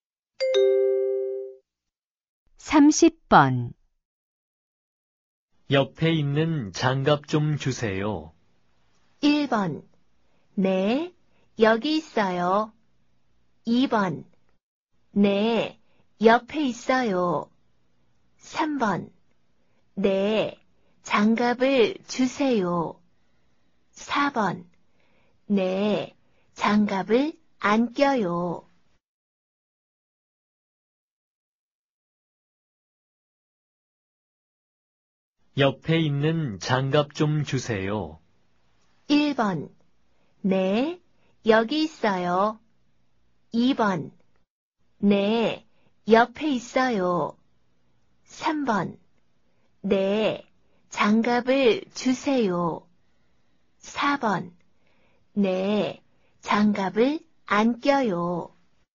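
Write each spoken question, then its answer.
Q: 옆에 있는 장갑 좀 주세요.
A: 1: 네, 여기 있어요.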